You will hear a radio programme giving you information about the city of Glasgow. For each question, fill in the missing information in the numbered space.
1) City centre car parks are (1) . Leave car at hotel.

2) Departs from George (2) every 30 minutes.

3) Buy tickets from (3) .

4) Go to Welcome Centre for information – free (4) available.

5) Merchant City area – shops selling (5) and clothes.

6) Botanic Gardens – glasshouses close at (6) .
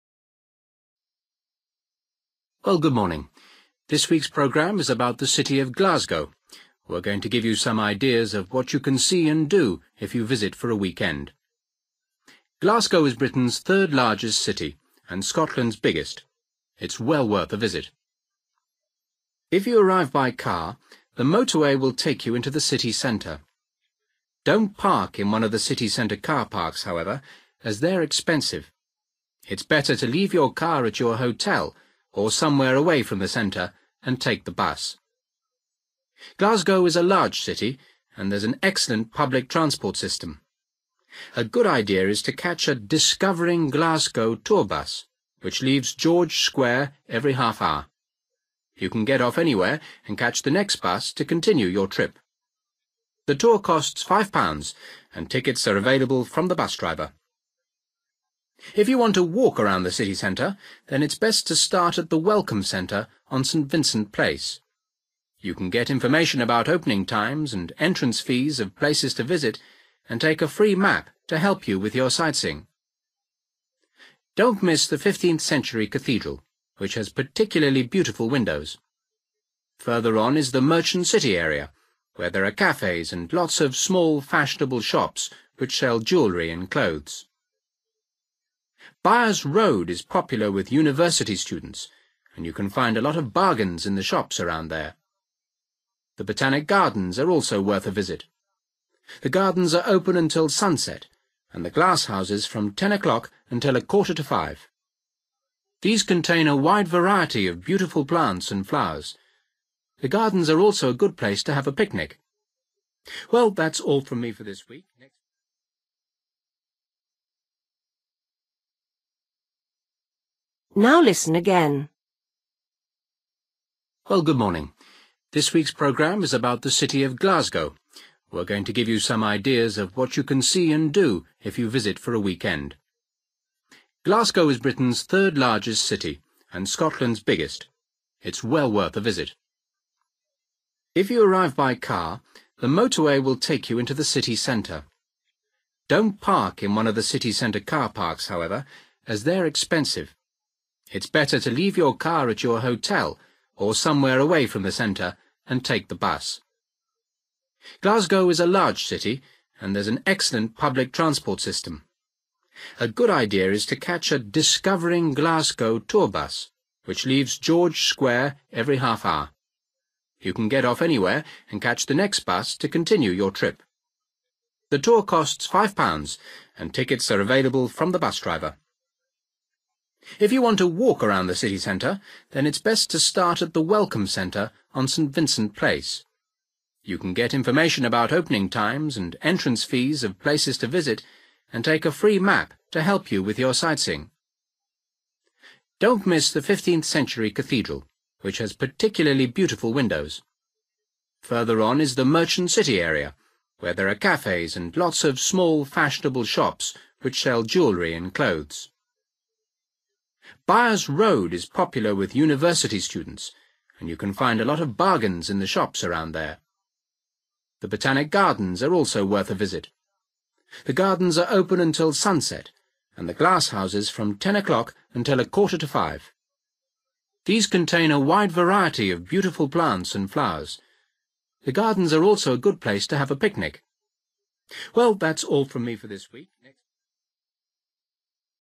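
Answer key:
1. expensive
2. Square
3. the bus driver
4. map
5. jewellery
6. 4:45

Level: Luyện nghe trình độ B1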